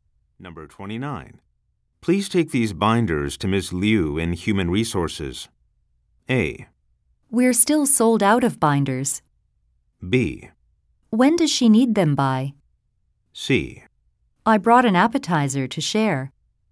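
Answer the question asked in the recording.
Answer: B: When does she need them by?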